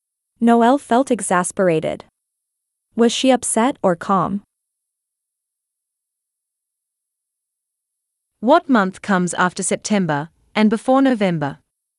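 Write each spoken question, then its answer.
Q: Was she upset or calm?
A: Upset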